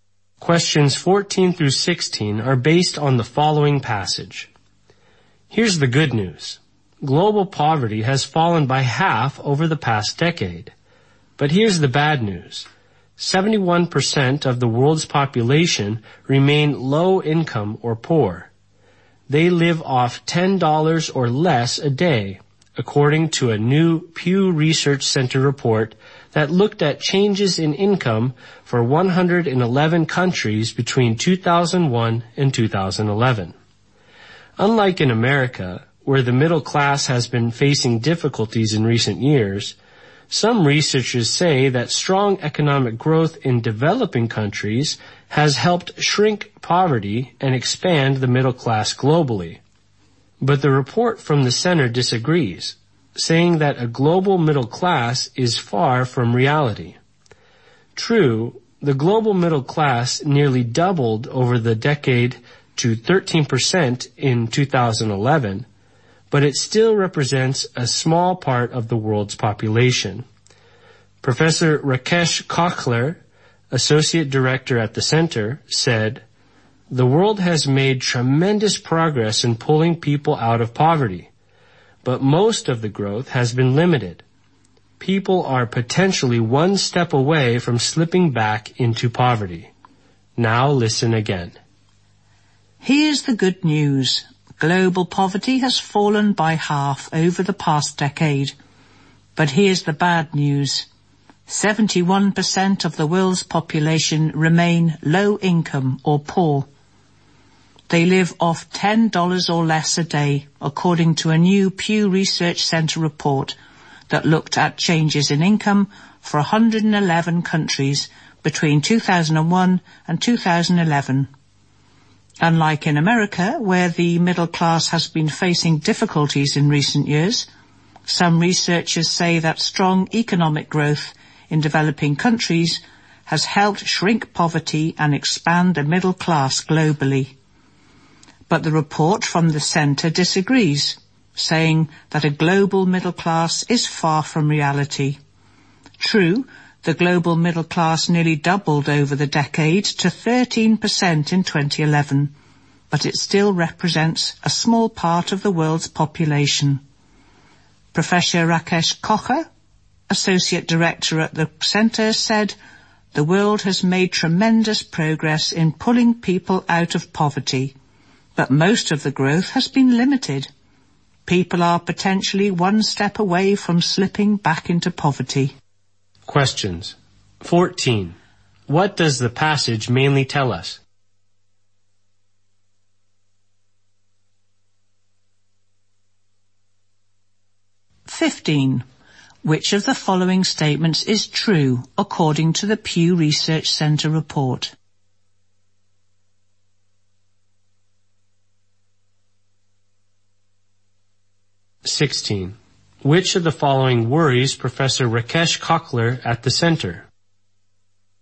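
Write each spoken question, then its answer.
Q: What does the passage mainly tell us?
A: Global poverty has fallen, but most people remain low income or poor

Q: Which of the following worries Professor Rakesh Kocher at the center?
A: People may easily slip back into poverty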